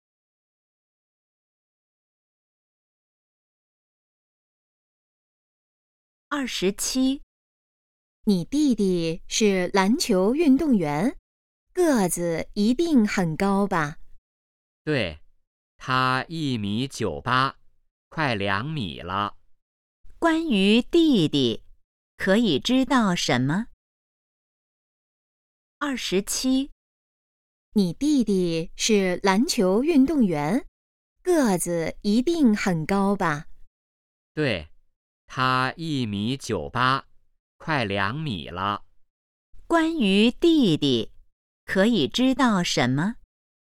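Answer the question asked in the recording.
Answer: 个子很高,快2米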